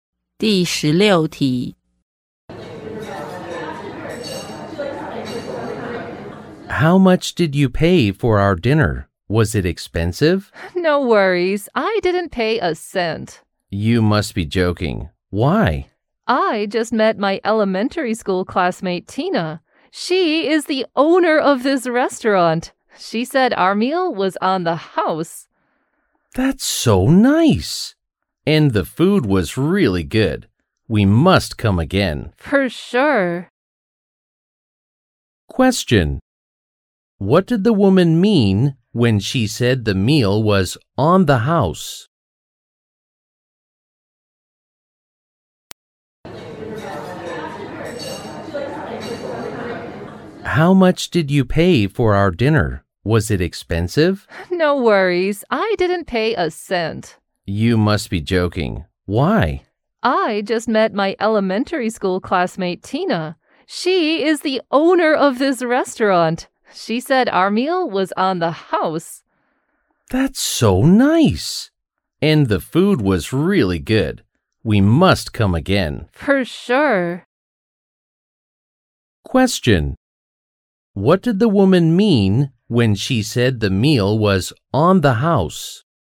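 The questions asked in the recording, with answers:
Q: What did the woman mean when she said the meal was on the house?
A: The meal was free; the owner paid for it.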